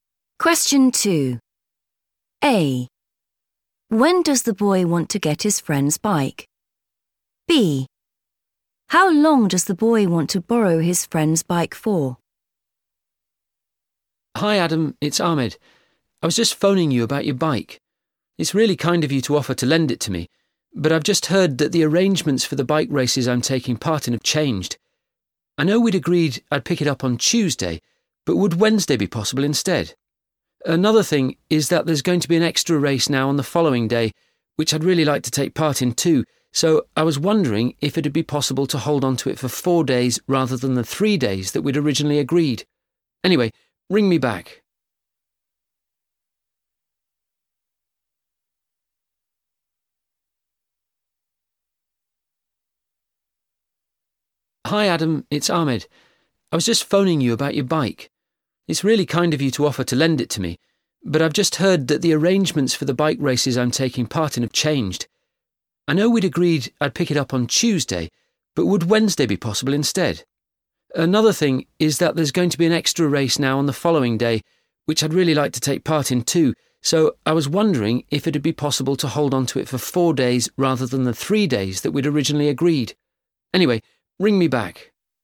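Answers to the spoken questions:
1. Wednesday
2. 4 days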